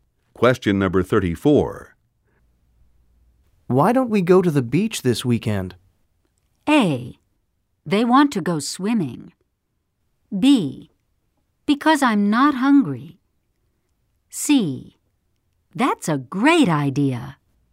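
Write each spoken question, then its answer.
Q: Why don't we go to the beach this weekend?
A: C: That's a great idea.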